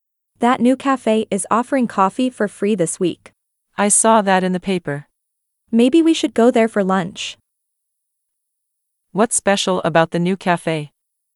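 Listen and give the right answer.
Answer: free coffee this week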